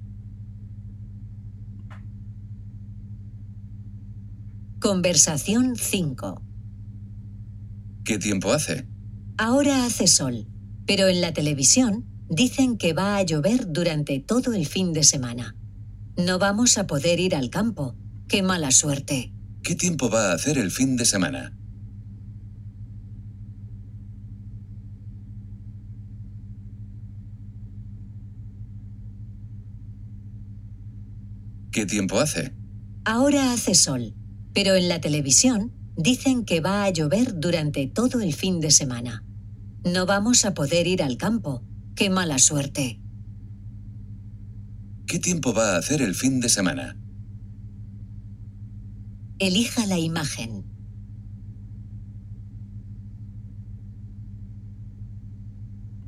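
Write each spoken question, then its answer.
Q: ¿Qué tiempo va a hacer el fin de semana?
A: Va a llover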